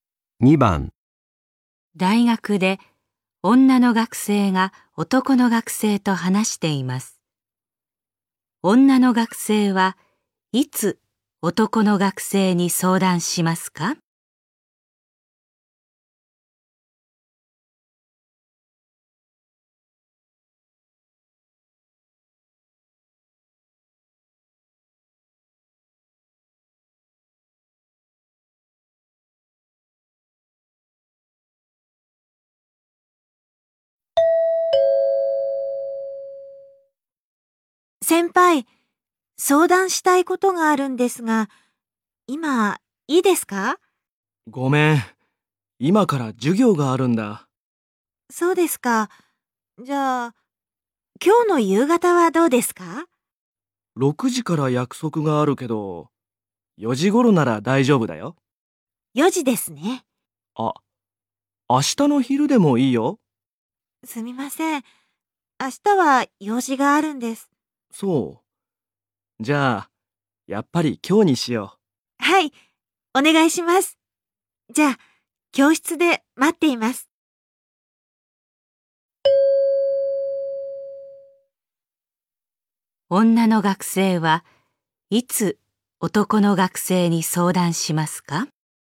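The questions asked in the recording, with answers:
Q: 女の学生はいつ男の学生に相談しますか?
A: 今日の4時頃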